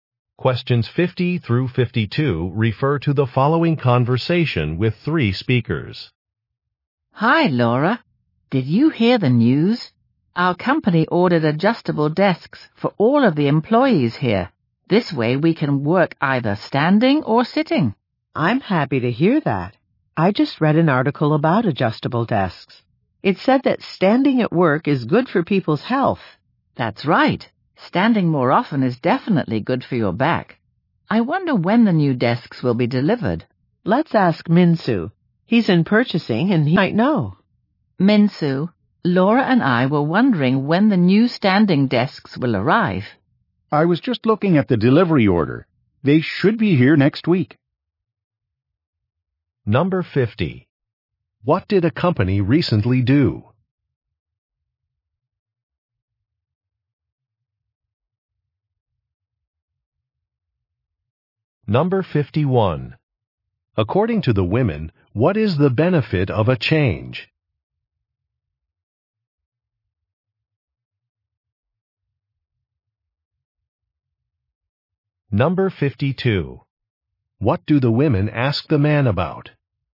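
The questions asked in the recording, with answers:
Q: What did a company recently do?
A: It ordered adjustable desks for its employees

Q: According to the women, what is the benefit of a change?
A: Better health (standing is good for the back)

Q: What do the women ask the man about?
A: When the desks will be delivered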